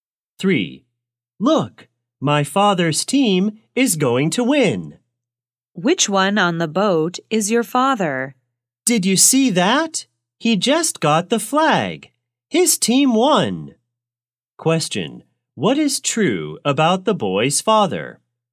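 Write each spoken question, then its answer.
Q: What is true about the boy's father?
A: He got the flag and his team won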